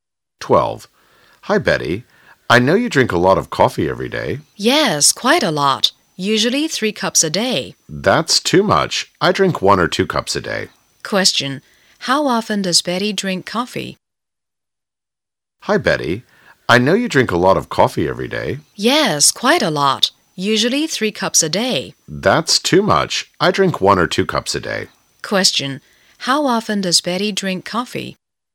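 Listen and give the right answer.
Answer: Every day (usually 3 cups a day)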